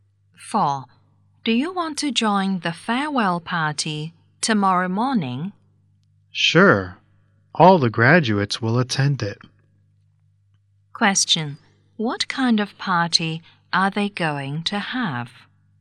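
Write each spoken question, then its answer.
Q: What kind of party are they going to have?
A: A farewell party.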